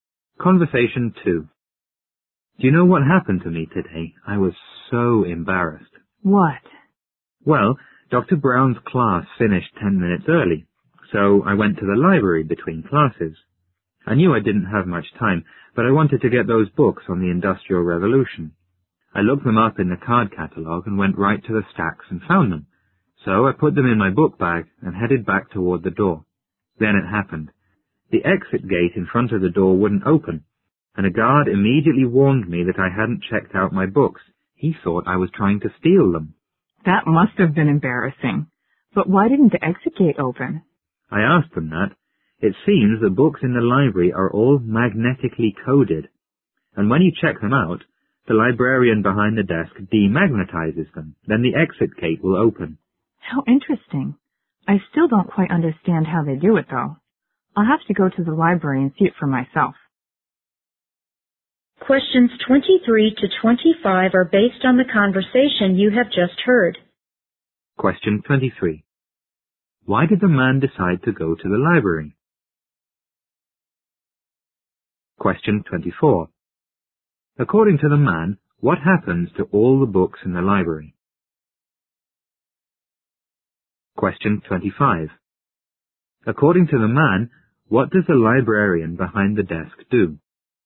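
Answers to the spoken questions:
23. Class ended early and he wanted books on the Industrial Revolution
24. They are magnetically coded
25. Demagnetizes the books when they are checked out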